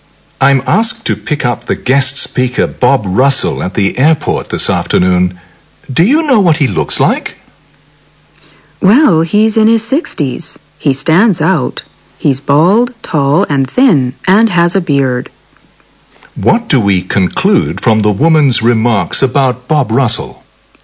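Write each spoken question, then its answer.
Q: What do we conclude from the woman's remarks about Bob Russell?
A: He is easy to recognize.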